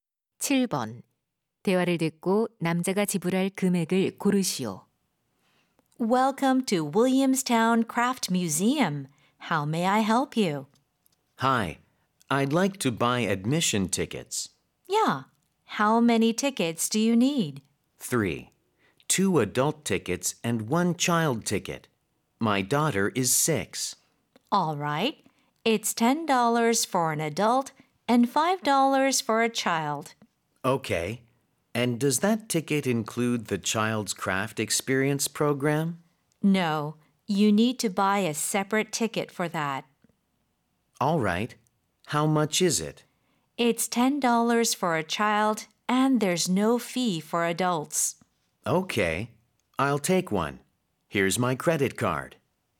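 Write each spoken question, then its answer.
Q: 대화를 듣고 남자가 지불할 금액을 고르시오.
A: 35달러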